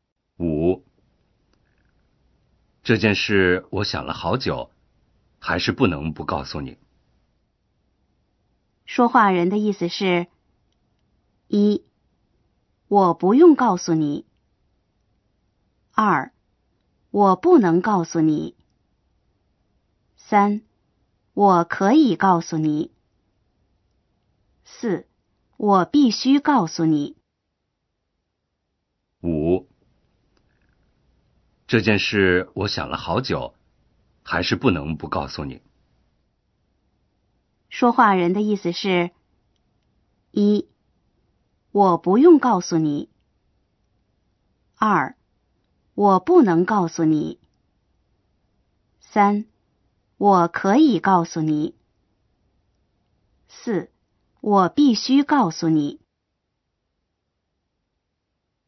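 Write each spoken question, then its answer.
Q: 说话人的意思是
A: 4: 我必须告诉你。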